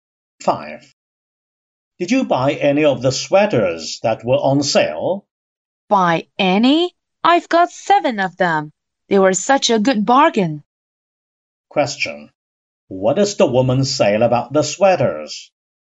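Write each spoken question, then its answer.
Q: What does the woman say about the sweaters?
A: They were a good bargain; she bought seven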